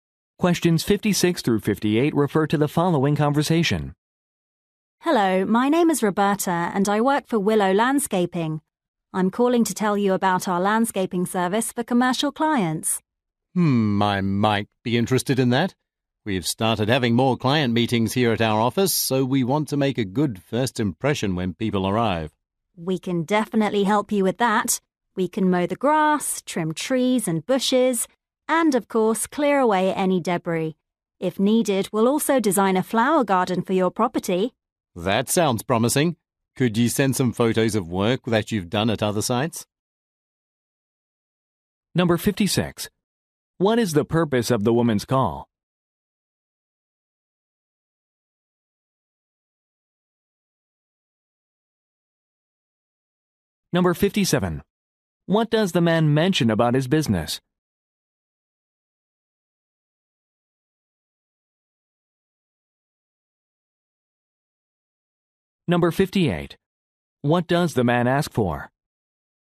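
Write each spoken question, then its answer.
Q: What is the purpose of the woman's call?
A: To offer landscaping services

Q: What does the man mention about his business?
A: It is holding more client meetings at the office

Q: What does the man ask for?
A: Photos of previous work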